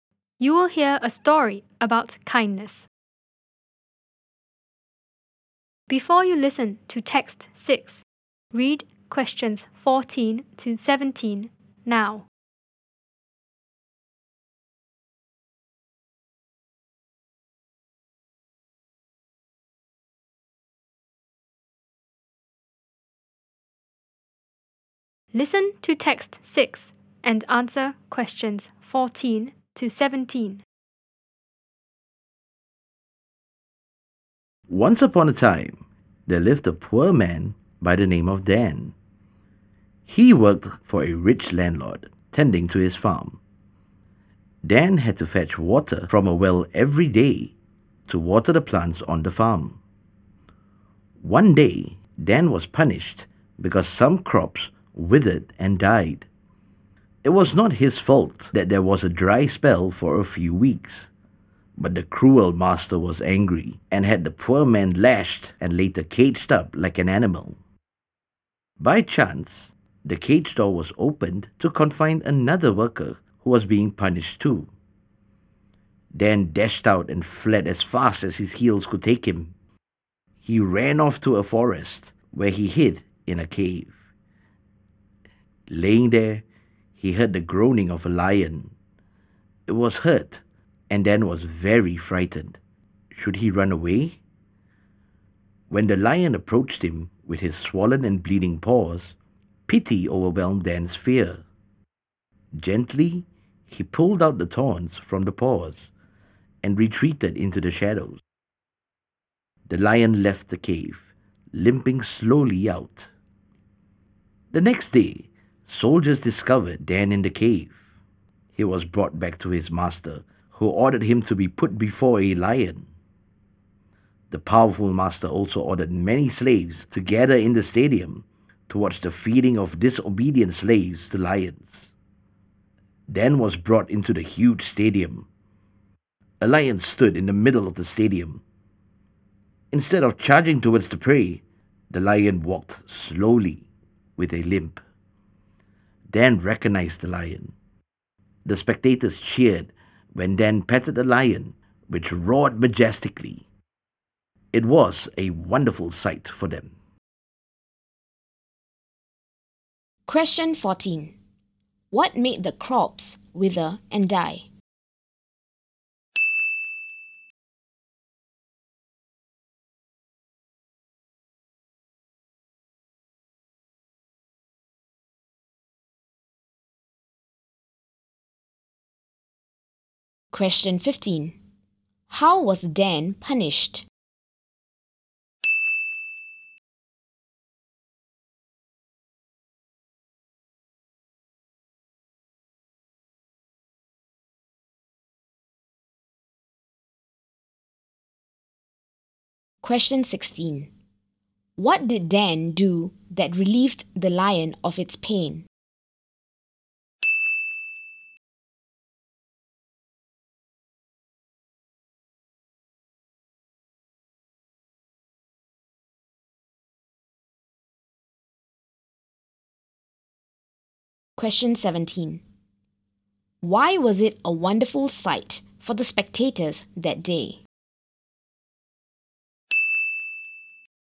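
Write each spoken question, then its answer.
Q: What made the crops wither and die?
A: A dry spell of a few weeks

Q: How was Dan punished?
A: He was lashed and caged up like an animal

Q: What did Dan do that relieved the lion of its pain?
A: He pulled the thorns out of its paws

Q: Why was it a wonderful sight for the spectators that day?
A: The lion did not attack Dan; Dan petted it and it roared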